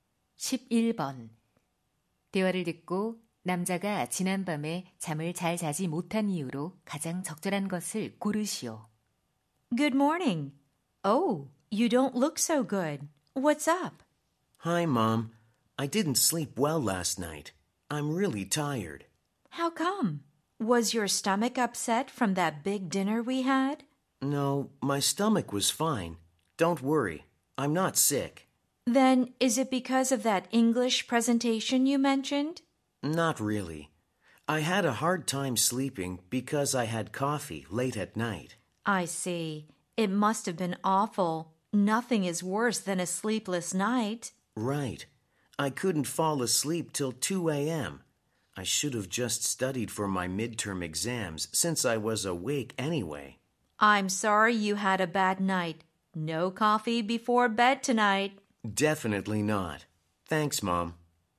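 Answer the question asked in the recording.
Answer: 밤늦게 커피를 마셔서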